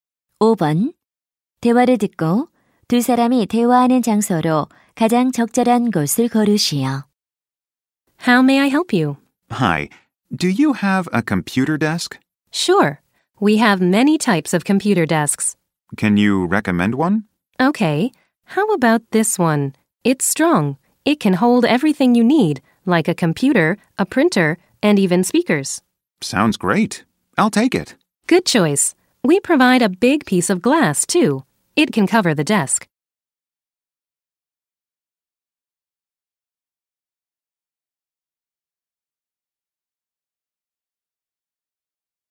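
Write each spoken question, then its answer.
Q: 대화를 듣고 두 사람이 대화하는 장소로 가장 적절한 곳을 고르시오.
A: 가구점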